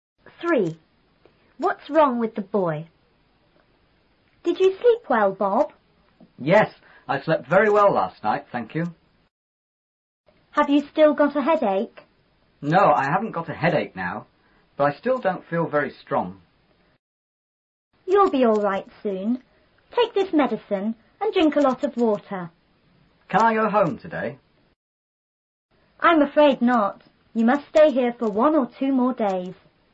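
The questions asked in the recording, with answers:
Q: What's wrong with the boy?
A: He still doesn't feel very strong.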